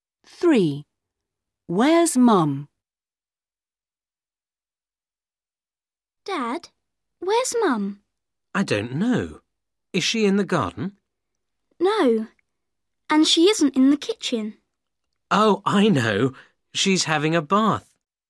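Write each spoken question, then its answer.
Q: Where's Mum?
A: in the bath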